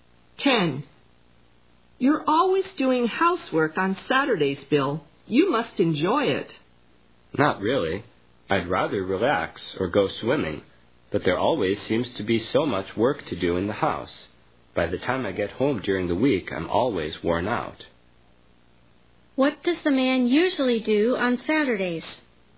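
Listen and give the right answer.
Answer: Housework.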